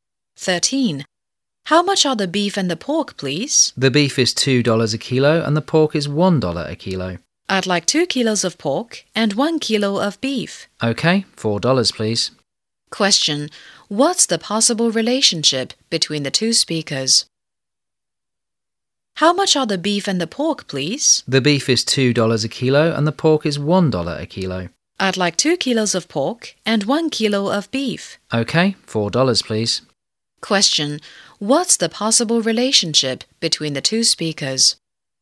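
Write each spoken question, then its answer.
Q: Question. What's the possible relationship between the two speakers?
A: Customer and shop assistant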